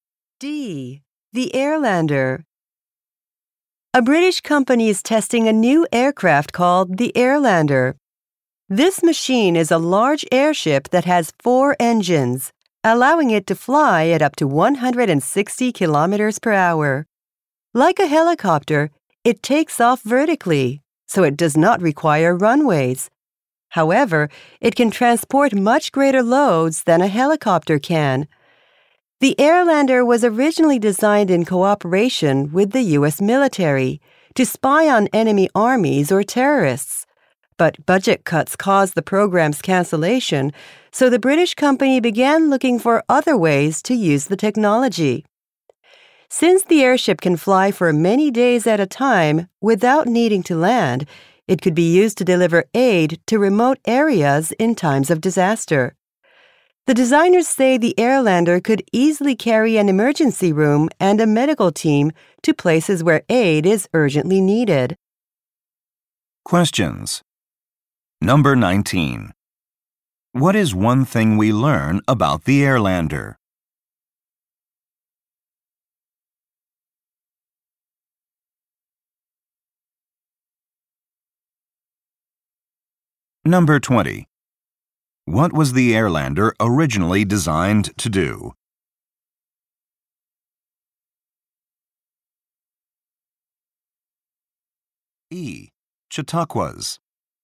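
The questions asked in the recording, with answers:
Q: What was the Airlander originally designed to do?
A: To spy on enemy armies or terrorists for the U.S. military.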